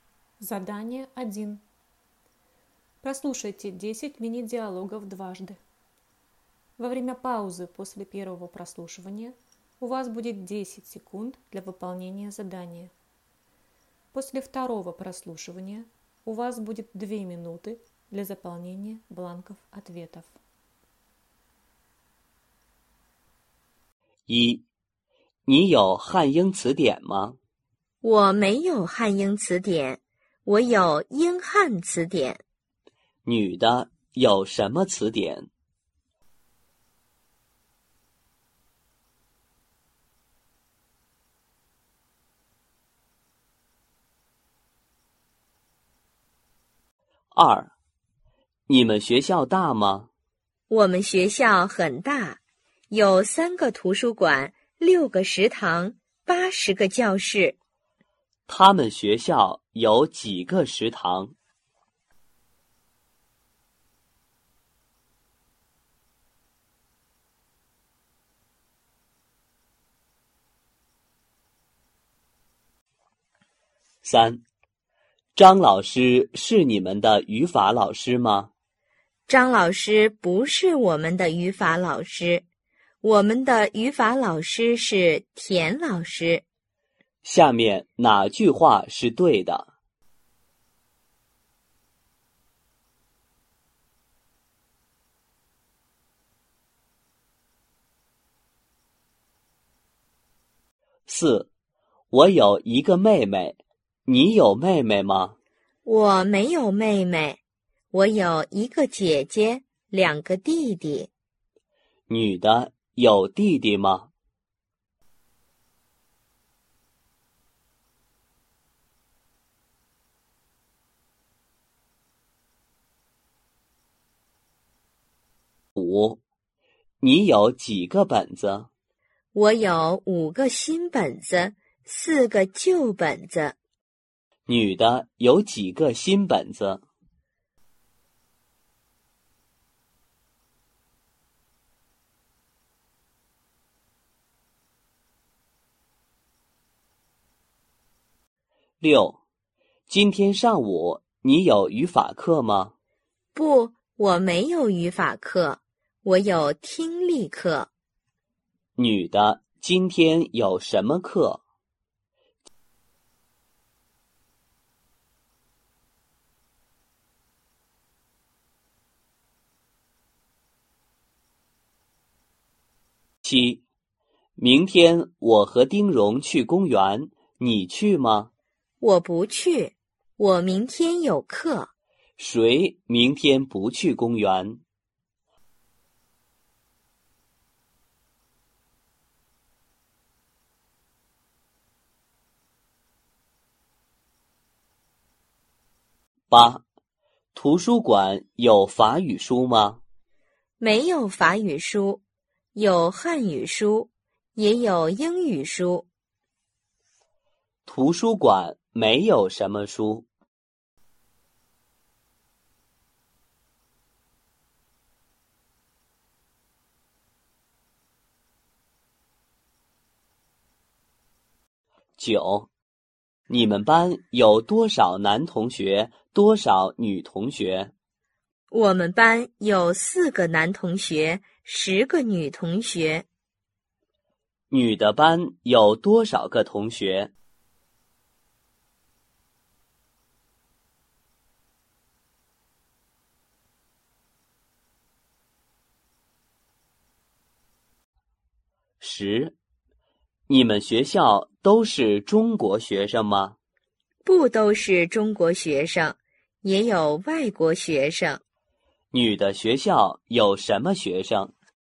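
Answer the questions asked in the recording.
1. 英汉词典
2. 六个
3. 有,两个弟弟
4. 五个
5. 听力课
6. 女的
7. 法语书
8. 十四个
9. 中国学生和外国学生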